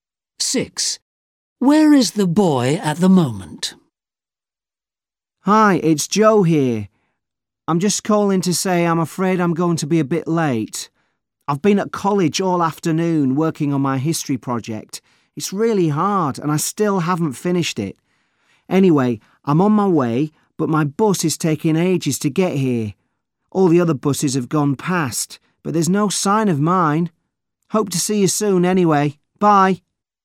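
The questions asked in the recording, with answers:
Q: Where is the boy at the moment?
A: At a bus stop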